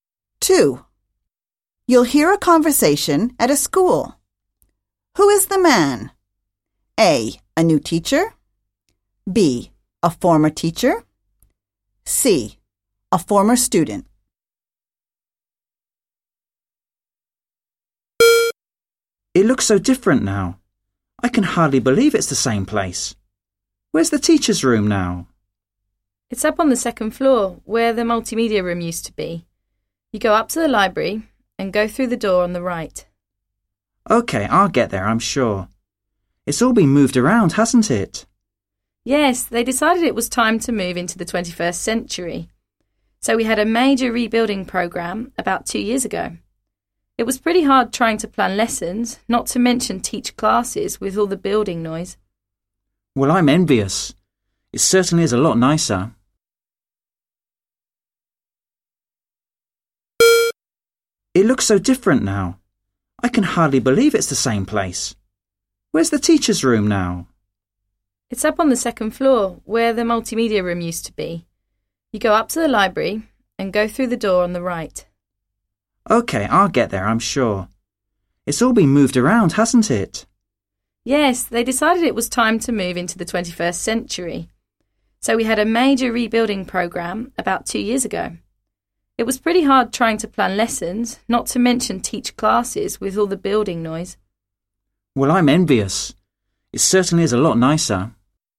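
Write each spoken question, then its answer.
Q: Who is the man?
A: B: A former teacher.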